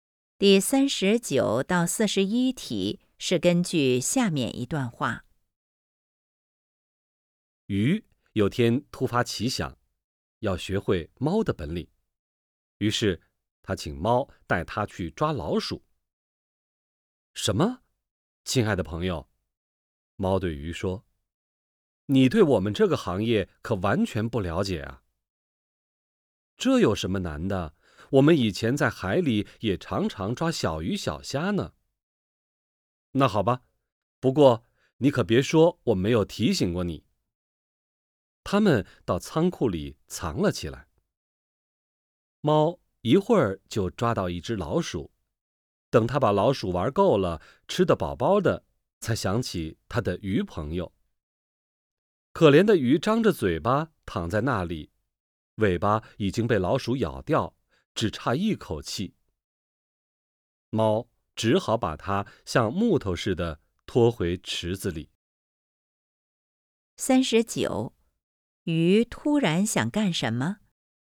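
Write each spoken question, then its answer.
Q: 鱼突然想干什么?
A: 学猫抓老鼠

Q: 这个故事里,鱼最后的结果怎么样?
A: 尾巴被老鼠咬掉,差点死了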